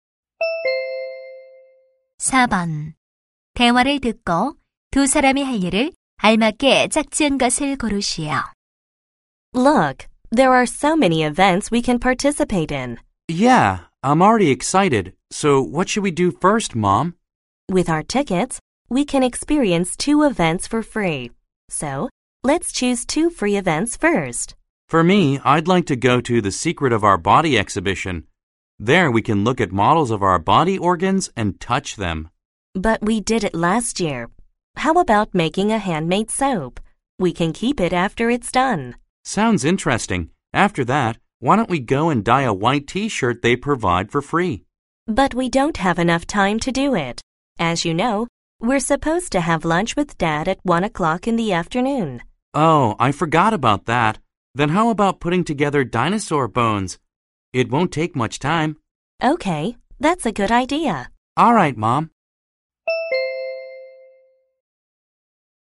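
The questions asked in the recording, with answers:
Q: 대화를 듣고 두 사람이 할 일을 알맞게 짝지은 것을 고르시오.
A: 수제 비누 만들기와 공룡 뼈 맞추기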